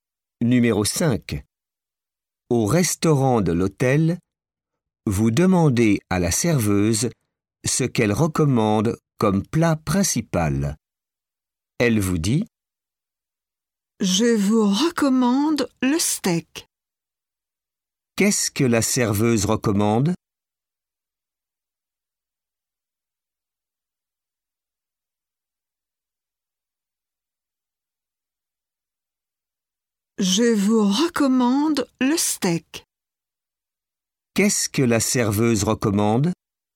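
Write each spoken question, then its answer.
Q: Qu'est-ce que la serveuse recommande?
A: Le steak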